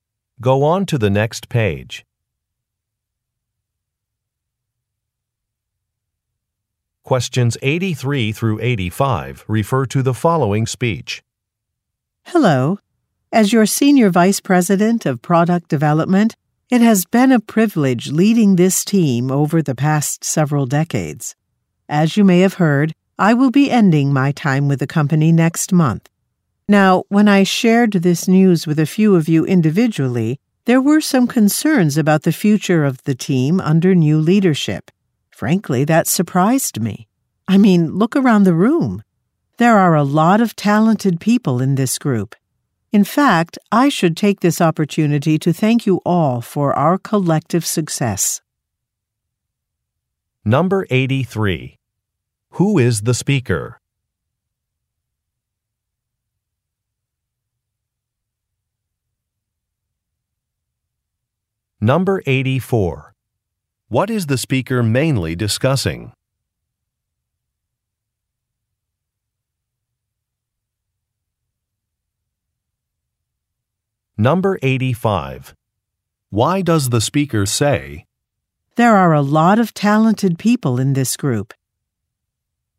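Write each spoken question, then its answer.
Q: Who is the speaker?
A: The Senior Vice President of Product Development

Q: What is the speaker mainly discussing?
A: Her upcoming departure from the company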